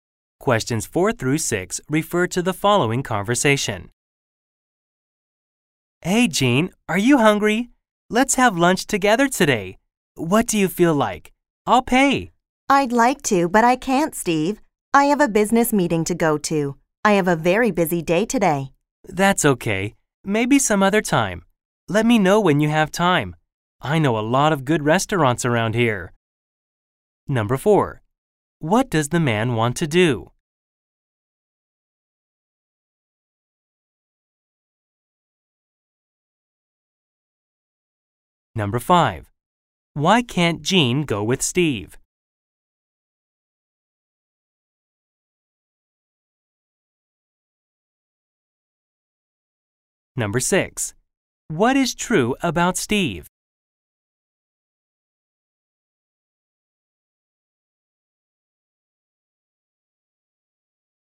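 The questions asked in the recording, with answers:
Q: What does the man want to do?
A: Have lunch with Jean

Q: Why can't Jean go with Steve?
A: She has a business meeting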